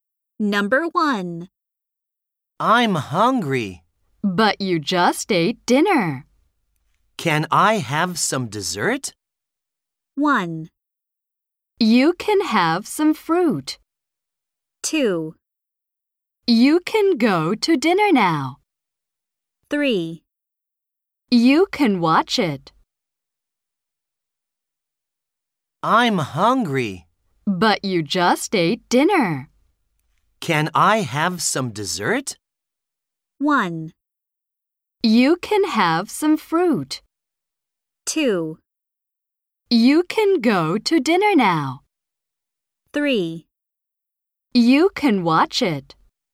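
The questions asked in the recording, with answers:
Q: Can I have some dessert?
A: 1: You can have some fruit.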